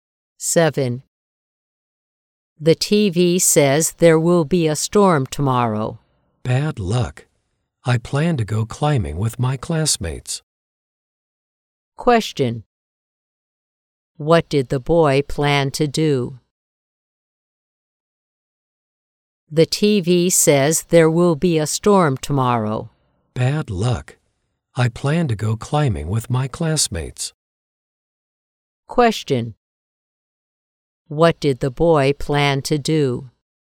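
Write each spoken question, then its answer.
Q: What did the boy plan to do?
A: Go climbing with his classmates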